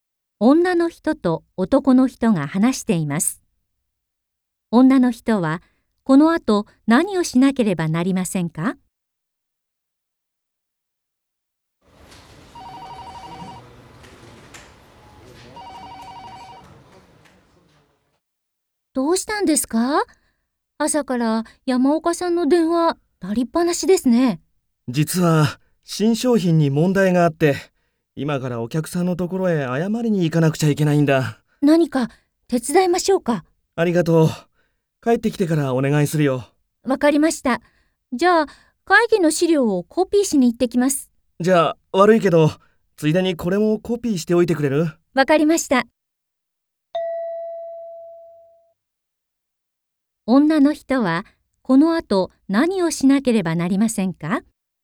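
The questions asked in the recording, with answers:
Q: 女の人はこのあと何をしなければなりませんか?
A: 会議の資料と頼まれたものをコピーする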